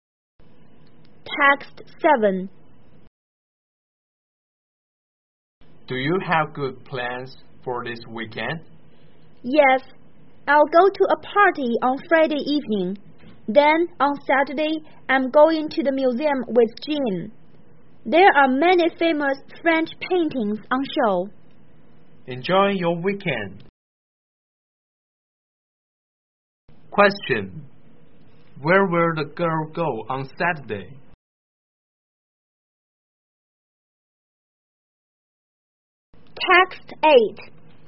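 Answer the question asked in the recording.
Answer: To the museum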